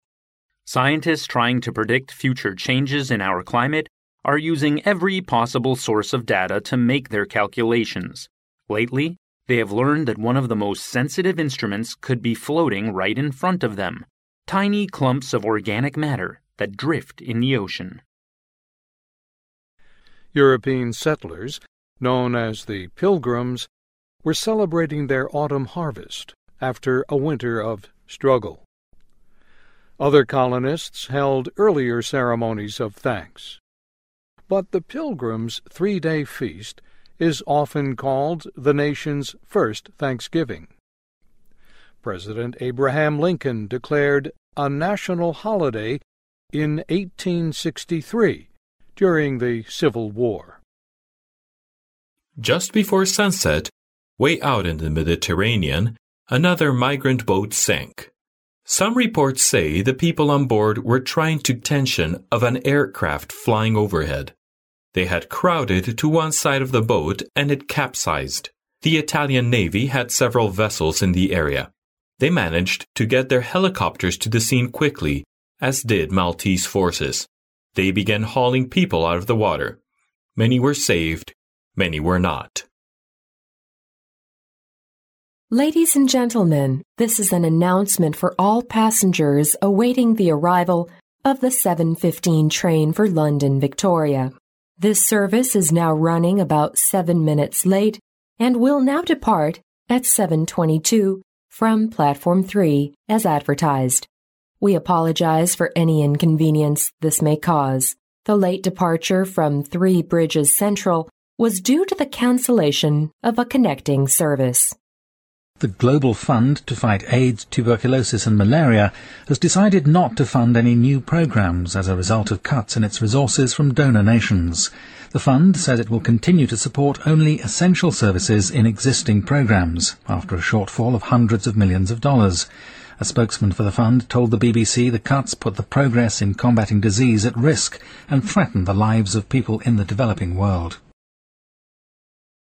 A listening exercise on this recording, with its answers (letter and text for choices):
Section C In this section, you will hear five short new items. Each item will be read only once. After each item there will be a fifteen-second pause. During the pause, read the question and the four choices marked A, B, C and D, and decide which is the best answer. Then mark the corresponding letter on the answer sheet with a single line through the centre.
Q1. What are scientists going to do with the tiny clumps of organic matter drifting in the ocean? ______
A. To do the research on food chain in the ocean.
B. To collect samples of new species in the ocean.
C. To predict future changes in our climate.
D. To calculate certain sensitive instruments.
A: C. To predict future changes in our climate.

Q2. How long did the first Thanksgiving Day last? ______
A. Three weeks.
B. Two weeks.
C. Three days.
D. Two days.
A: C. Three days.

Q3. What caused the boat wreck? ______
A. The boat leaked during the voyage.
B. There was a big storm in the Mediterranean.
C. People on the boat were frightened by a whale in the sea.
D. People crowded to one side of the boat.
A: D. People crowded to one side of the boat.

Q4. What is said about the 7:15 train to London? ______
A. It has been cancelled.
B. It will leave from a different platform.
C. It has been delayed.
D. It will arrive as scheduled.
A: C. It has been delayed.

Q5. Why does the global fund stop supporting any new programmes? ______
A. Because the number of AIDS infectors increases sharply.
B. Because there is a shortfall from donor nations.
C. Because the existing programmes waste a lot of money.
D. Because there are too many new programmes.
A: B. Because there is a shortfall from donor nations.

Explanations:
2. 清教徒们历时三天的一个宴会被视为第一个感恩节,故选C项。
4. 该新闻是车站的播报。广播中要求乘坐7:15火车的乘客注意,该车晚点7分钟。因此选择C项。
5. 停止支持新项目的原因是捐赠国家减少了捐助。

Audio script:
[听力原文] Scientists trying to predict future changes in our climate are using every possible source of data to make their calculations. Lately, they have learned that one of the most sensitive instruments could be floating right in front of them—tiny clumps of organic matter that drift in the ocean.
[听力原文] European settlers known as the Pilgrims were celebrating their autumn harvest after a winter of struggle. Other colonists held earlier ceremonies of thanks. But the Pilgrims' three-day feast is often called the nation's first Thanksgiving. President Abraham Lincoln declared a national holiday in 1863 during the Civil War.
[听力原文] Just before sunset, way out in the Mediterranean another migrant boat sank. Some reports say the people on board were trying to attract the attention of an aircraft flying overhead. They had crowded to one side of the boat and it capsized. The Italian navy had several vessels in the area. They managed to get their helicopters to the scene quickly as did Maltese forces. They began hauling people out of the water. Many were saved, many were not.
[听力原文] Ladies and gentlemen, this is an announcement for all passengers awaiting the arrival of the 7:15 train for London, Victoria. This service is now running about 7 minutes late and will now depart at 7:22 from platform 3 as advertised. We apologize for any inconvenience this may cause. The late departure from Three Bridges Central was due to the cancellation of a connecting service.
[听力原文] The global fund to fight AIDS, tuberculosis and malaria has decided not to fund any new programmes as a result of cuts in its resources from donor nations. The fund says it will continue to support only essential services m existing programmes after a shortfall of hundreds of millions of dollars. A spokesman for the fund told the BBC the cuts put the progress in combating disease at risk and threatened the lives of people in the developing world.